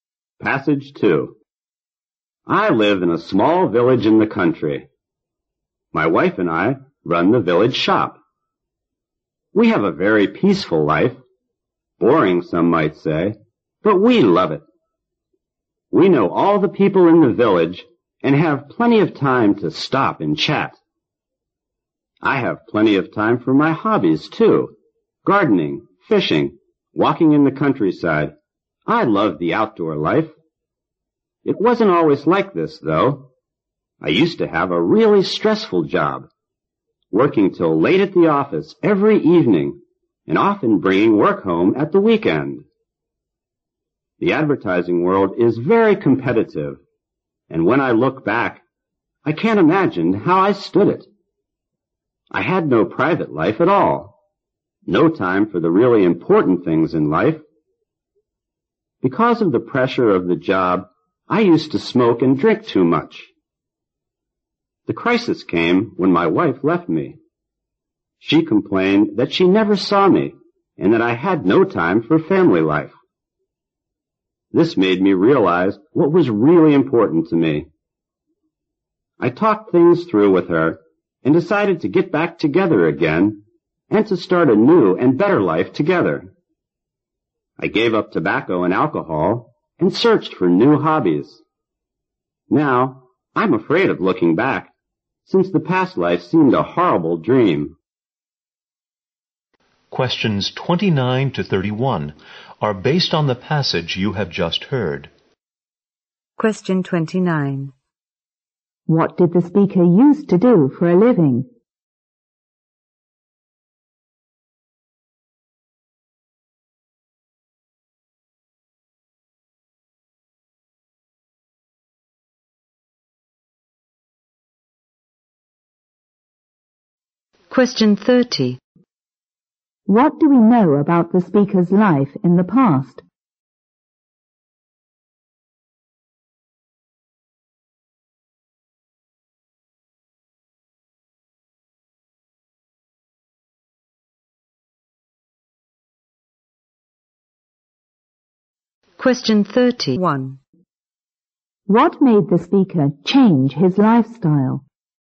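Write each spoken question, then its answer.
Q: What did the speaker use to do for a living?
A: He worked in advertising

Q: What do we know about the speaker's life in the past?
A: It was stressful, with no private life

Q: What made the speaker change his lifestyle?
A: His wife left him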